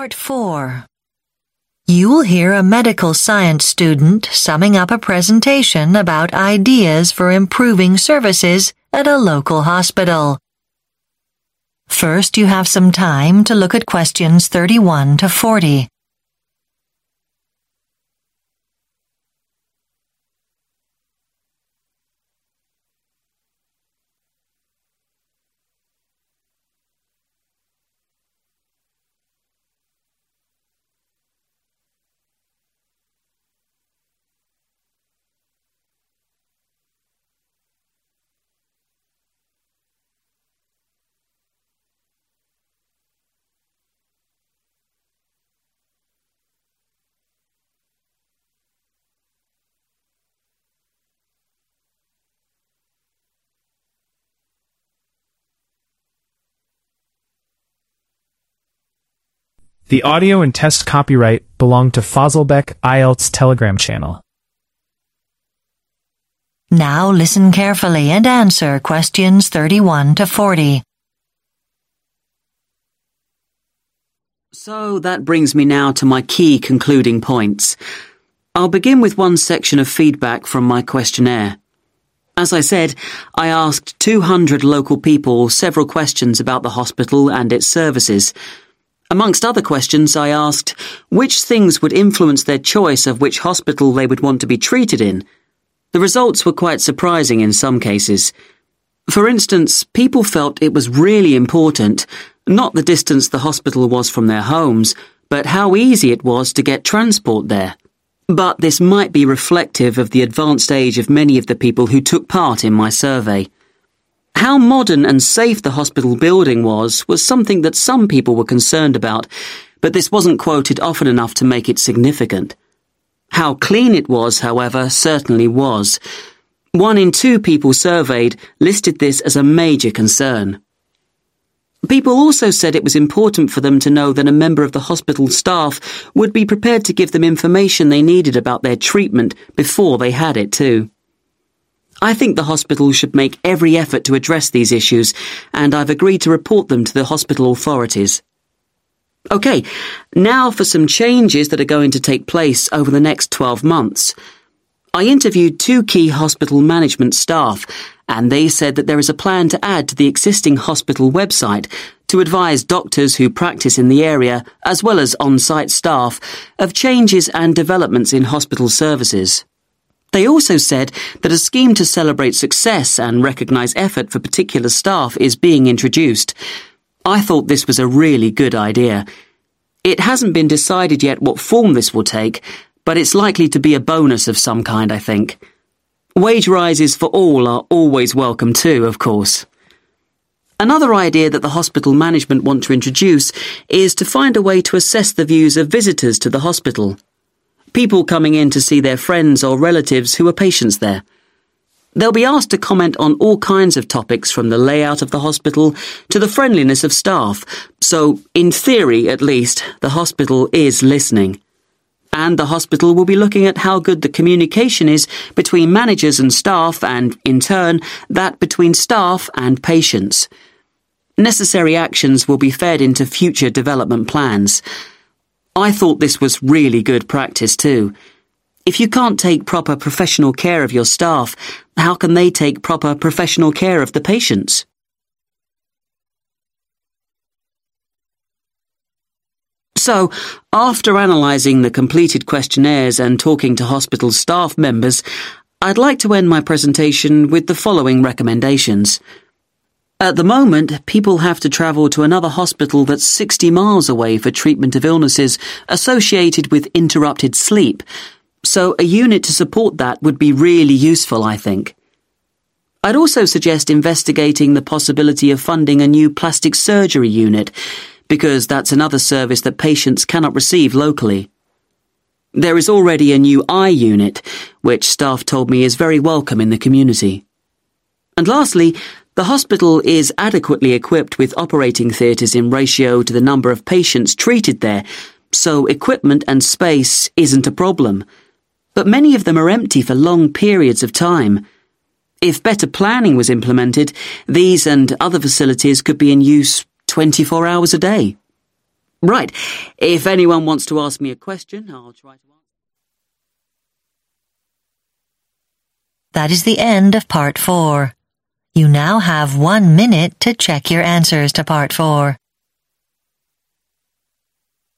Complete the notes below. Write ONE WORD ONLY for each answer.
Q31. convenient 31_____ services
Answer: transport

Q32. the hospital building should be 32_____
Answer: clean

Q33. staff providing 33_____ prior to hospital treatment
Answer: information

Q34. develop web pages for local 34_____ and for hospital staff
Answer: doctors

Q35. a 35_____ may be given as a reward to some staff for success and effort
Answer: bonus

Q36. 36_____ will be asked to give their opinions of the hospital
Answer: visitors

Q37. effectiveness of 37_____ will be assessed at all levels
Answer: communication

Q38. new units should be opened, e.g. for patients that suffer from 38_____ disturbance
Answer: sleep

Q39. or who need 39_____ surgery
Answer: plastic

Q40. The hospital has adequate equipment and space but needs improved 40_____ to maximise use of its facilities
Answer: planning